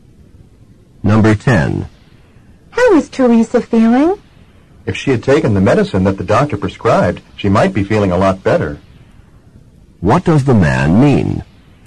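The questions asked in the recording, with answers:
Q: What does the man mean?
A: Teresa didn't take her medicine and isn't feeling well.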